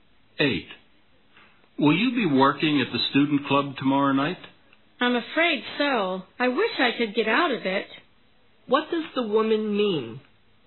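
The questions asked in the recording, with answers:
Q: What does the woman mean?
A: She will have to work at the student club tomorrow night but doesn't want to.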